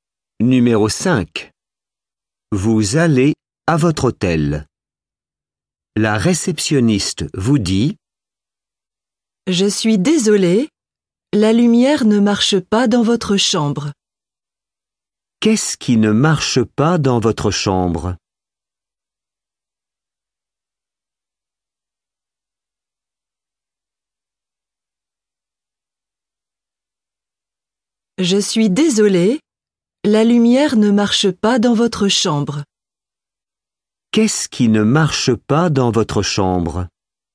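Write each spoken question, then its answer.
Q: Qu'est-ce qui ne marche pas dans votre chambre?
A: La lumière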